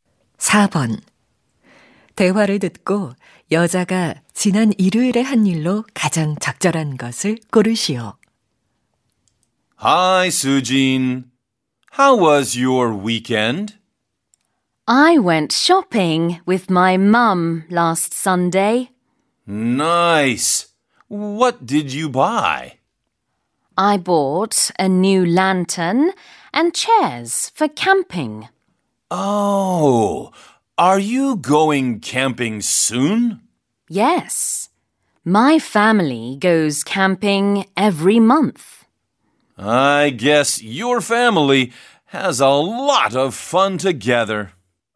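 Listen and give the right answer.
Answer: 엄마와 쇼핑하기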